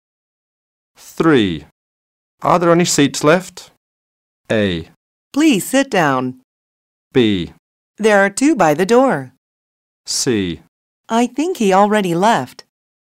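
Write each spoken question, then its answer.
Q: Are there any seats left?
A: B: There are two by the door.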